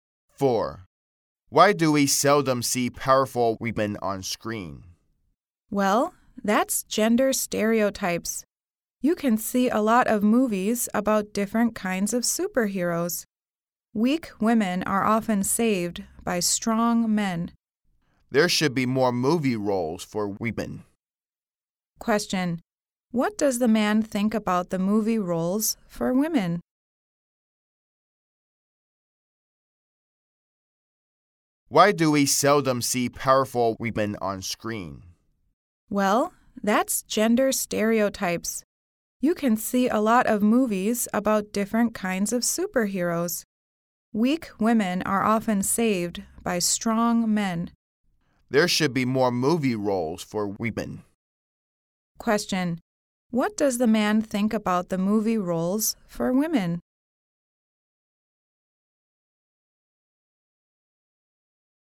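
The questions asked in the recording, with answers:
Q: What does the man think about the movie roles for women?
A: There should be more movie roles for women.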